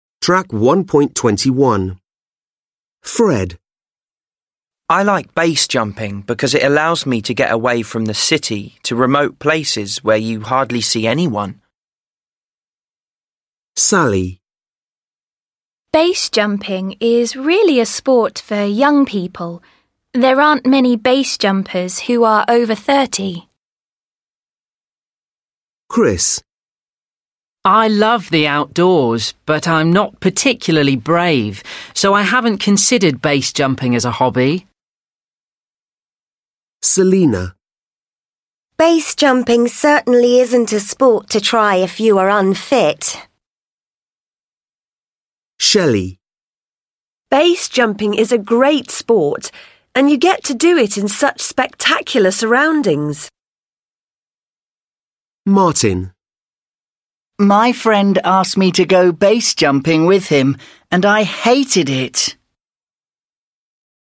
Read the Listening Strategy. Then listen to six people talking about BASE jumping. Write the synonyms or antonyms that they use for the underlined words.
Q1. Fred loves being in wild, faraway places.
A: remote (synonym)

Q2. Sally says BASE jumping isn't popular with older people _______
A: over 30 (synonym)

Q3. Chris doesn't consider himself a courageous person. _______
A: brave (synonym)

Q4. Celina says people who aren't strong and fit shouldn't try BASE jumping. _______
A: unfit (antonym)

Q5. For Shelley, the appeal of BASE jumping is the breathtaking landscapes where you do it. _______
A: spectacular (synonym)

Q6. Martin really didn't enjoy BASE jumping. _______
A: hated (antonym)

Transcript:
Fred: I like BASE jumping because it allows me to get away from the city, to remote places where you hardly see anyone.
Sally: BASE jumping is really a sport for young people. There aren't many BASE jumpers who are over 30.
Chris: I love the outdoors, but I'm not particularly brave, so I haven't considered BASE jumping as a hobby.
Celina: BASE jumping certainly isn't a sport to try if you are unfit.
Shelfy: BASE jumping is a great sport and you get to do it in such spectacular surroundings.
Martin: My friend asked me to go BASE jumping with him, and I hated it.

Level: Lớp 10